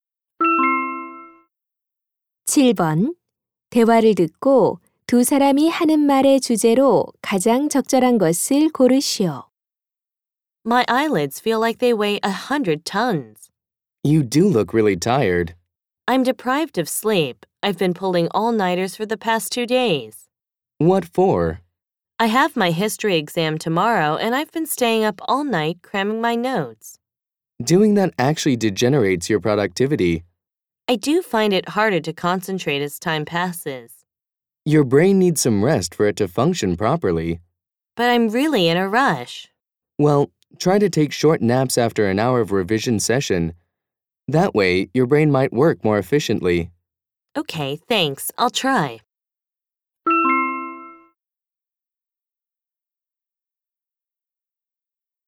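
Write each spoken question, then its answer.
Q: 대화를 듣고 두 사람이 하는 말의 주제로 가장 적절한 것을 고르시오.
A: 밤샘 공부의 비효율성과 휴식의 중요성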